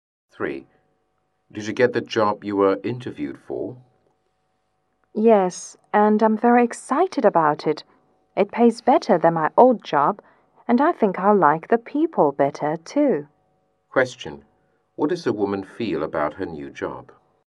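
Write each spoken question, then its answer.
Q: What does the woman feel about her new job?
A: She is excited and pleased with it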